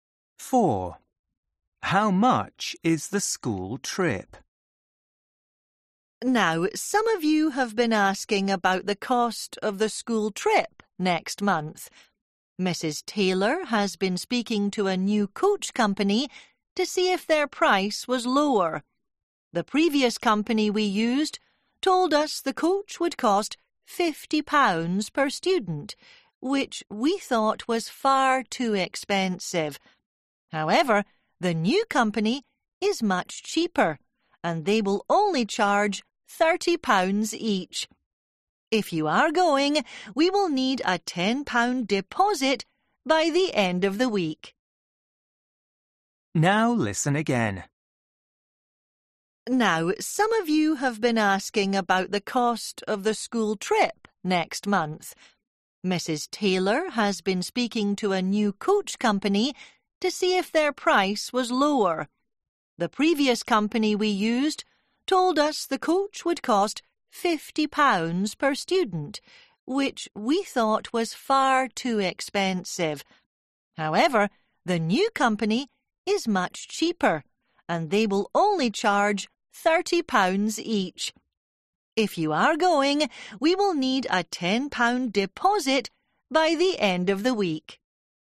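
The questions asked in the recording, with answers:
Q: How much is the school trip?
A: £30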